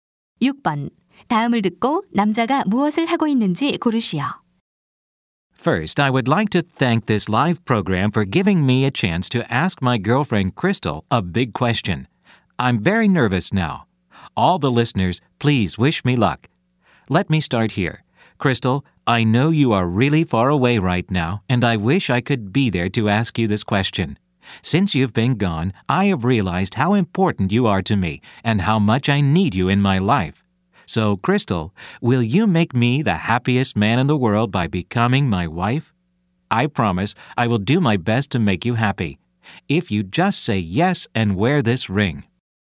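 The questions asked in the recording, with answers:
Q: 다음을 듣고 남자가 무엇을 하고 있는지 고르시오.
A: 라디오 생방송에서 여자친구에게 청혼하고 있다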